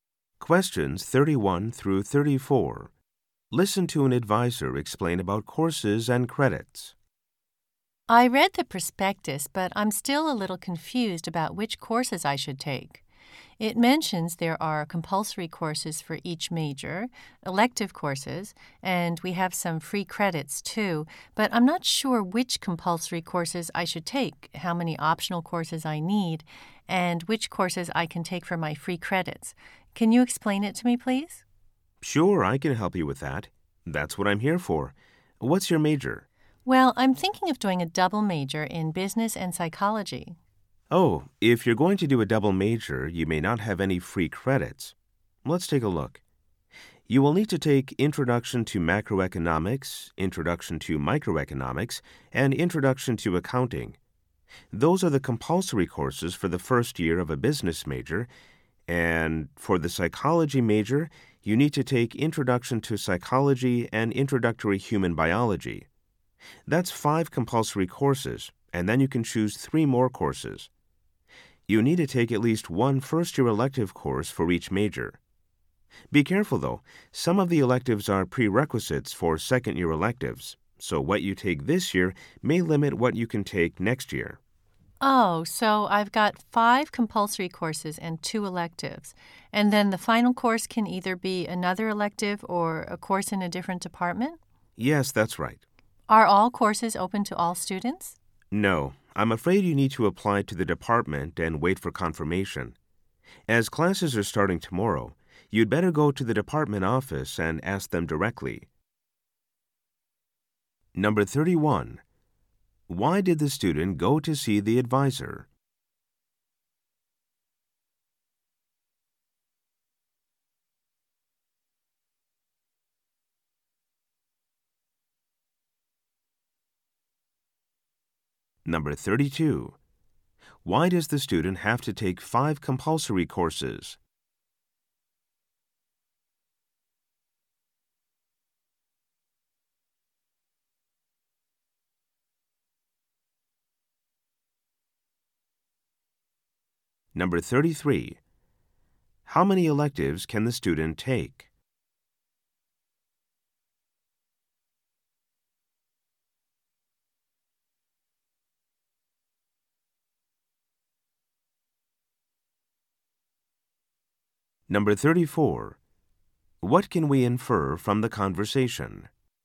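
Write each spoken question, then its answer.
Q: Why did the student go to see the advisor?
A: To get help choosing courses and understanding credits

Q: Why does the student have to take 5 compulsory courses?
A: Because the student plans a double major in business and psychology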